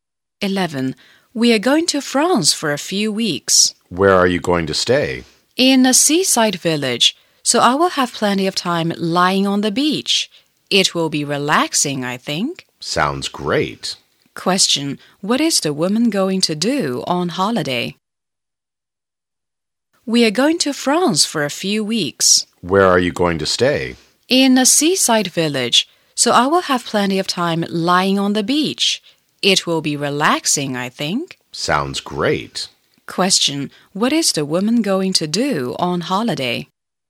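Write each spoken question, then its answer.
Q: Question. What is the woman going to do on holiday?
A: Relax lying on the beach in a seaside village in France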